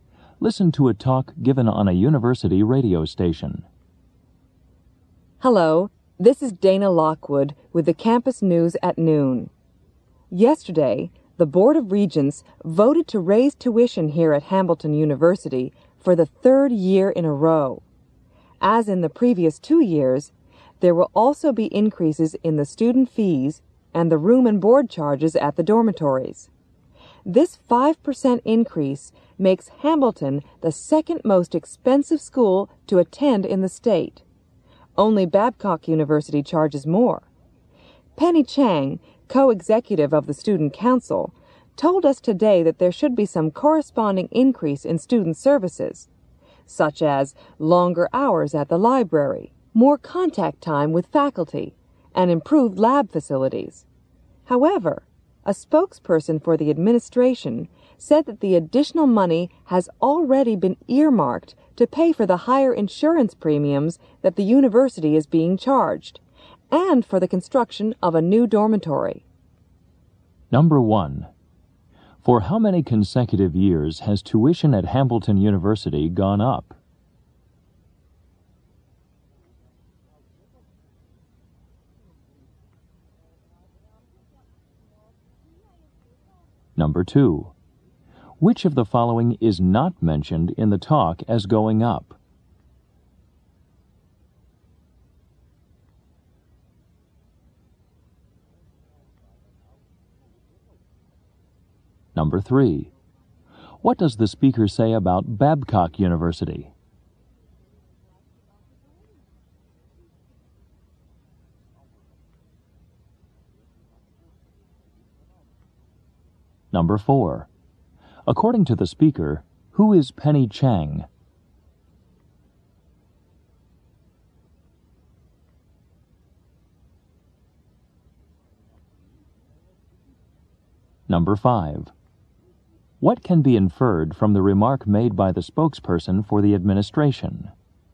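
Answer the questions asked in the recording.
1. Three years
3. It charges more than Hamilton; it is the most expensive school in the state
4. Co-executive of the Student Council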